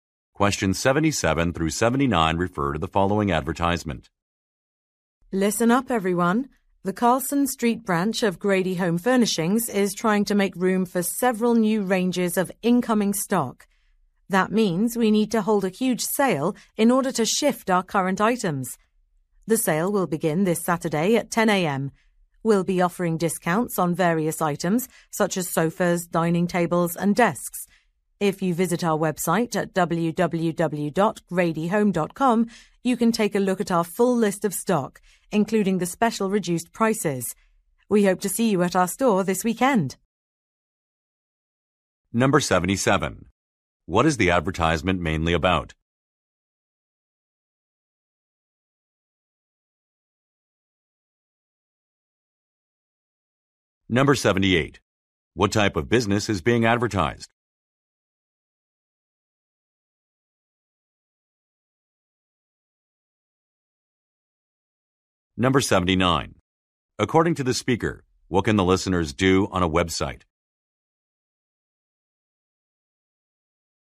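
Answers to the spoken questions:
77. A sale
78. A furniture store
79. See the full stock list and reduced prices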